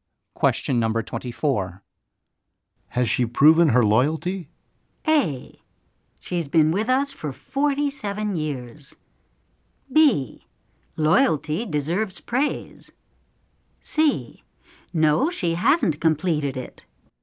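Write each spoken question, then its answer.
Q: Has she proven her loyalty?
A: A: She's been with us for 47 years.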